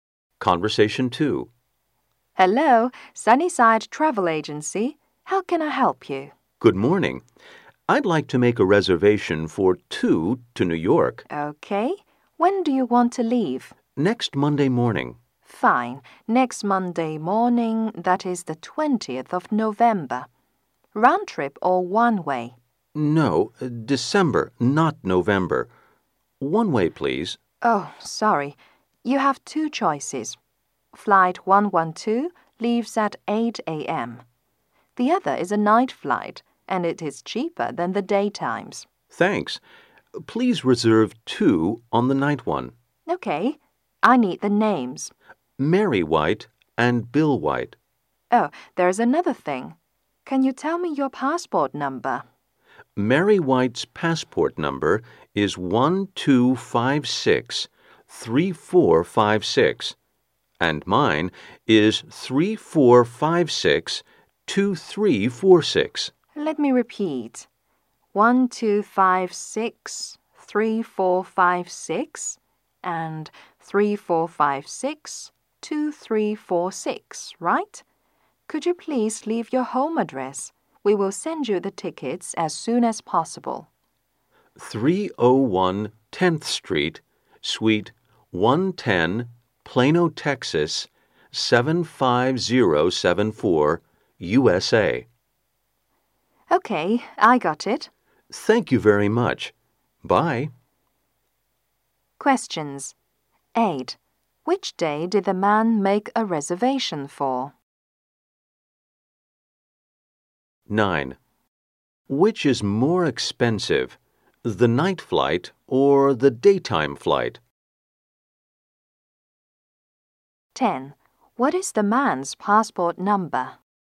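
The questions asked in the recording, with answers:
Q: Which day did the man make a reservation for?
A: Next Monday, December 20th

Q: Which is more expensive, the night flight or the daytime flight?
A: The daytime flight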